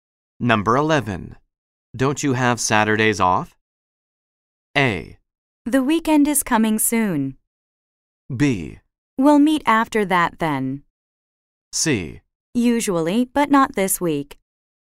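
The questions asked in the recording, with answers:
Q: Don't you have Saturdays off?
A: C: Usually, but not this week.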